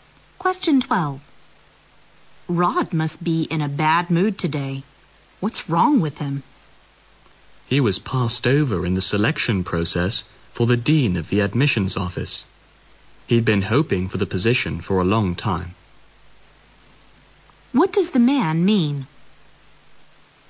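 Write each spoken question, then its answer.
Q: What does the man mean?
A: Rod is upset because he wasn't chosen as dean of the admissions office.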